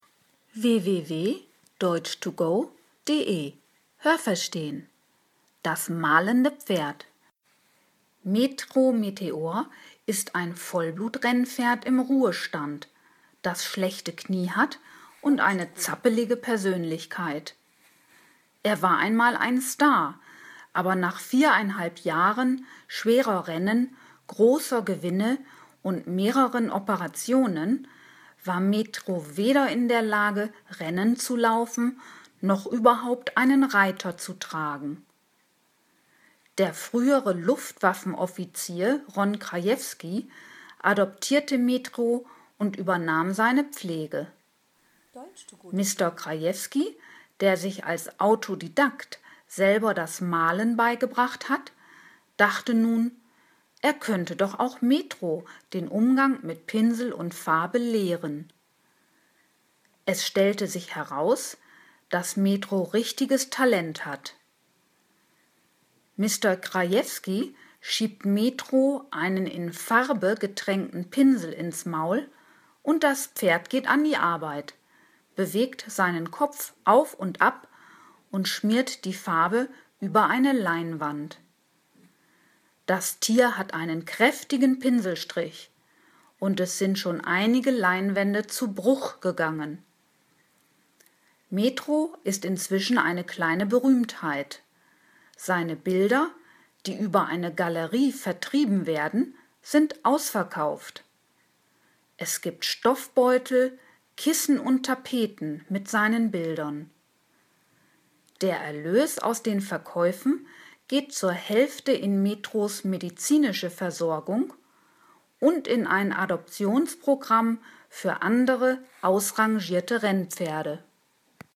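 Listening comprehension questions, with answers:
Haben Sie das gehört? Stimmt diese Aussage?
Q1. „Metro Meteor" ist ein altes Springpferd.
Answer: Nein, das habe ich nicht gehört.

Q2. Metro ist viereinhalb Jahre Rennen gelaufen.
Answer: Ja, das habe ich gehört.

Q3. Mr. Krajewski hat viel Geld für Metro bezahlt.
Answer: Nein, das habe ich nicht gehört.

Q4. Mr. Krajewski hat sich selber das Malen beigebracht und dachte, er könnte dies auch Metro vermitteln.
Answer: Ja, das habe ich gehört.

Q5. Es zeigte sich, dass Metro recht talentiert ist.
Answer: Ja, das habe ich gehört.

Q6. Metro frisst besonders gern Pinsel und Farbe.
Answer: Nein, das habe ich nicht gehört.

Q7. Metro malt, indem er mit den Hufen über den Boden kratzt.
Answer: Nein, das habe ich nicht gehört.

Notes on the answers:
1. Metro ist ein altes Renn pferd. (Ein Spring pferd springt über Hindernisse.)
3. Dazu sagt der Text nichts. 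Er hat Metro adoptiert und kümmert sich um seine Pflege.

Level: C1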